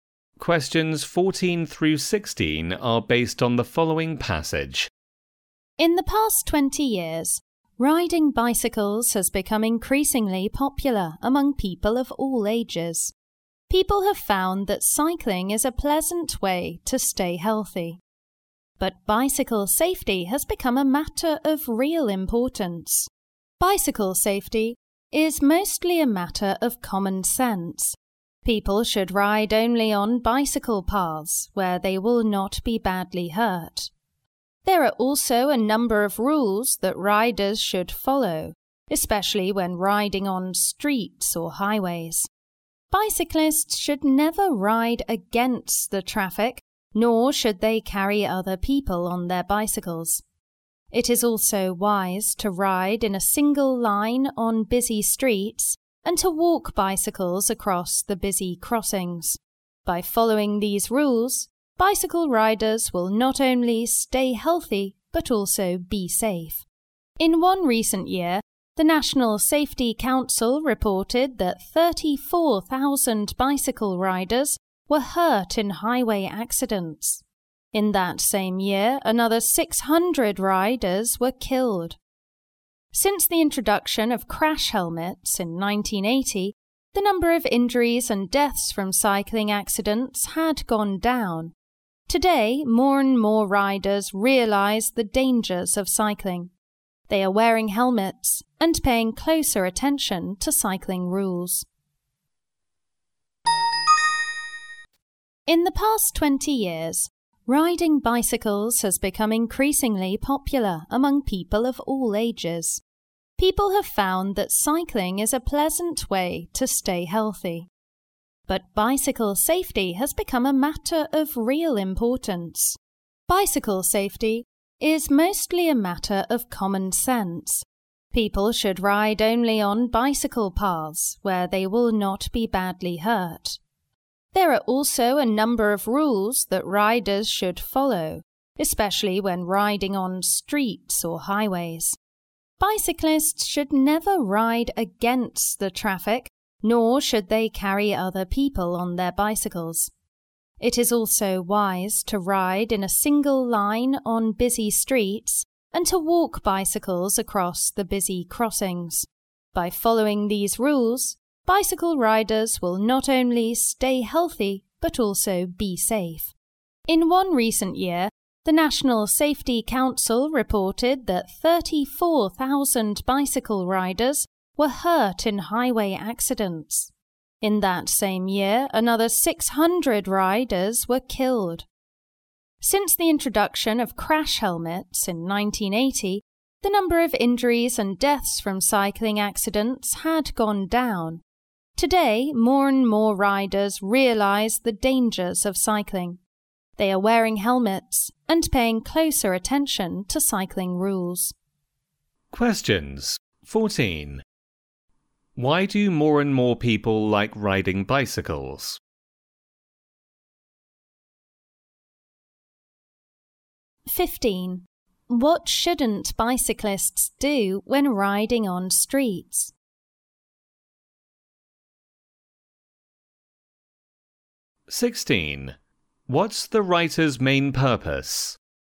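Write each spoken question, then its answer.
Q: Why do more and more people like riding bicycles?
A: It is a pleasant way to stay healthy

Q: What shouldn't bicyclists do when riding on streets?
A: Ride against the traffic or carry other people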